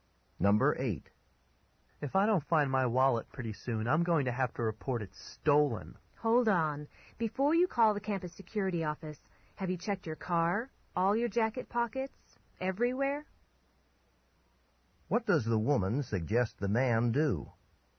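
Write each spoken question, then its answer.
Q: What does the woman suggest the man do?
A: Look for his wallet again (car, jacket pockets) before reporting it stolen.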